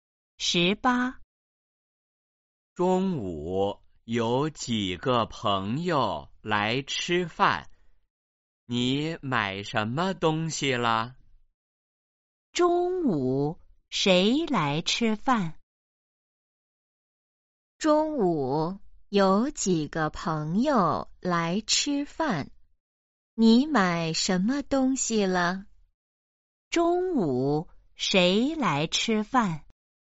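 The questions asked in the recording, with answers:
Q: 中午谁来吃饭?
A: 几个朋友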